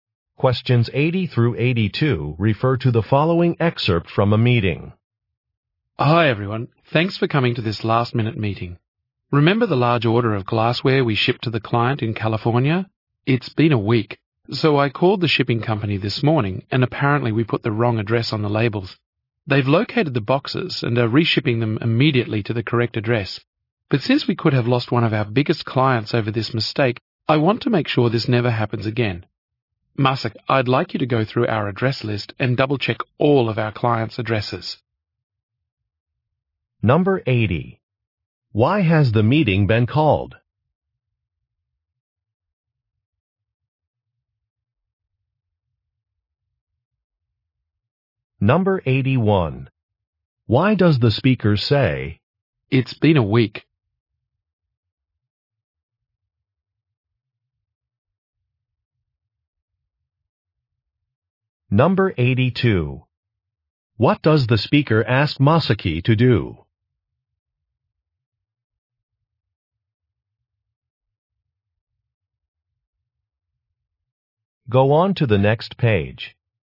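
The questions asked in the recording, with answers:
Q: Why has the meeting been called?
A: To talk about a shipping mistake

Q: Why does the speaker say, "It's been a week"?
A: The order was taking too long to arrive

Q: What does the speaker ask Masaki to do?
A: Double-check the clients' addresses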